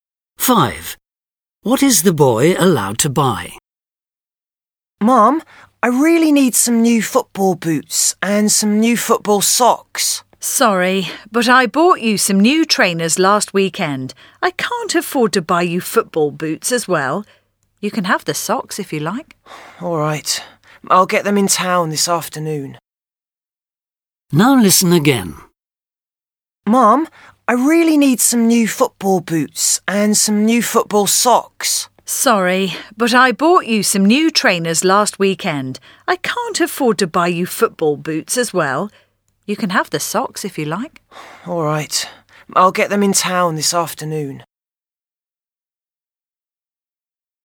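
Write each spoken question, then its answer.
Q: What is the boy allowed to buy?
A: Football socks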